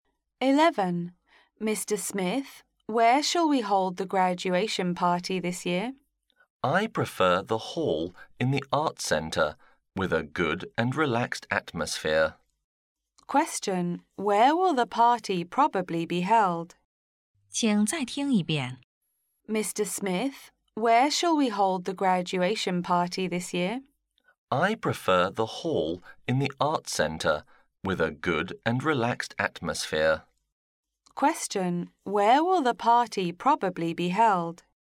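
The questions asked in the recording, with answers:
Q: Where will the party probably be held?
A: In the hall in the Art Centre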